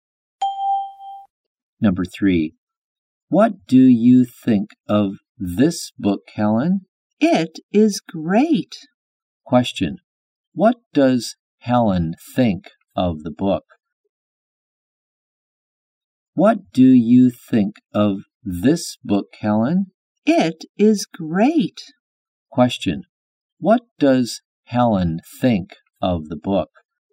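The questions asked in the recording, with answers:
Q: What does Helen think of the book?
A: It is great.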